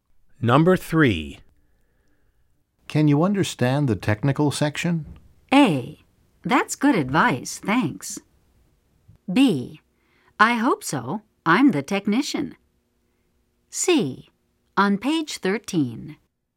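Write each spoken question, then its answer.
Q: Can you understand the technical section?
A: B: I hope so. I'm the technician.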